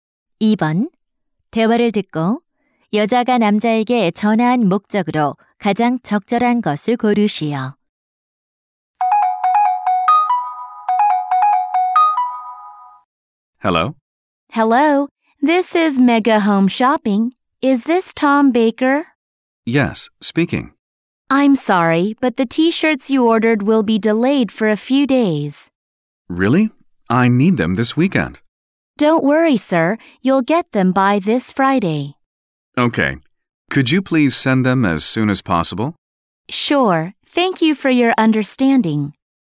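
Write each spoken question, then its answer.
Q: 대화를 듣고 여자가 남자에게 전화한 목적으로 가장 적절한 것을 고르시오.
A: 주문한 티셔츠 배송 지연을 알리려고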